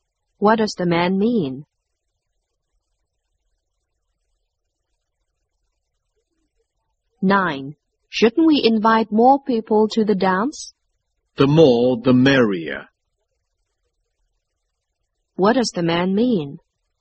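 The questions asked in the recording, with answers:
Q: What does the man mean?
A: They should invite more people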